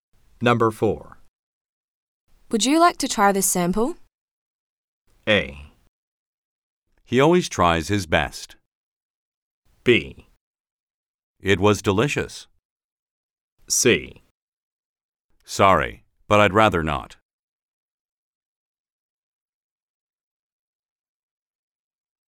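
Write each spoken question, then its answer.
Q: Would you like to try this sample?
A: C: Sorry, but I'd rather not.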